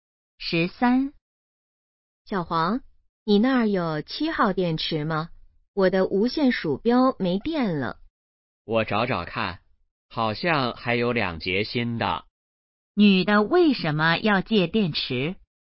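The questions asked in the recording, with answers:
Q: 女的为什么要借电池?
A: 无线鼠标没电了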